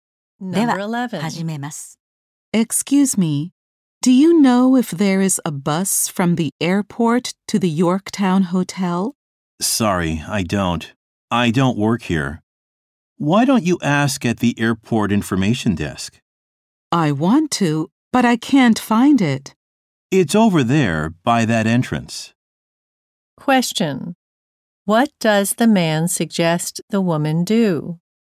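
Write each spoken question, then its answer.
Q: What does the man suggest the woman do?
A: Ask at the airport information desk.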